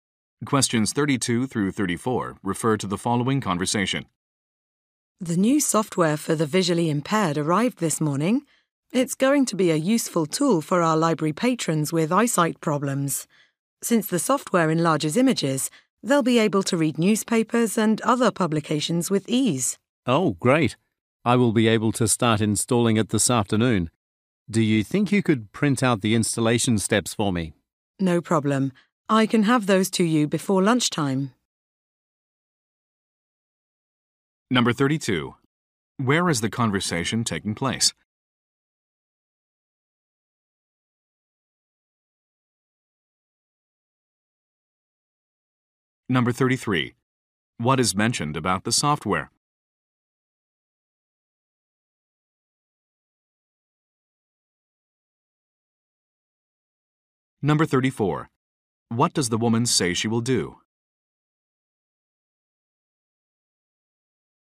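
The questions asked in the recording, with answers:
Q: Where is the conversation taking place?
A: At a library

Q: What is mentioned about the software?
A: It enlarges images so visually impaired people can read publications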